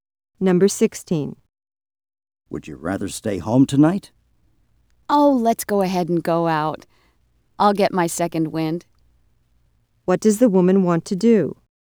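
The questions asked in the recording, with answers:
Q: What does the woman want to do?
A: Go out tonight.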